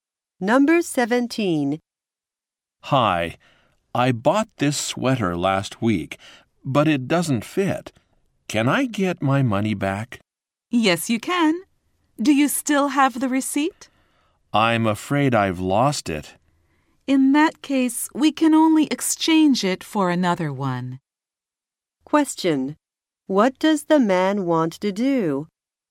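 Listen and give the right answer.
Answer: Get his money back for a sweater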